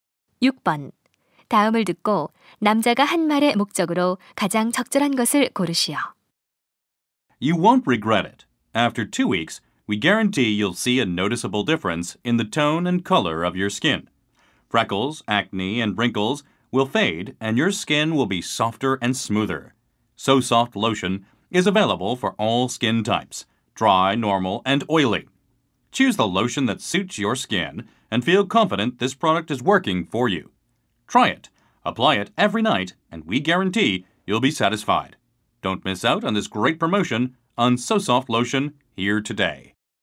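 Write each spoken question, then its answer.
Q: 다음을 듣고 남자가 한 말의 목적으로 가장 적절한 것을 고르시오.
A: 로션 제품 광고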